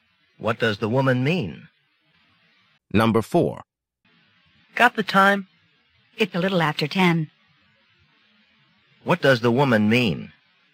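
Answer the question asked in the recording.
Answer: It's a little after 10 o'clock.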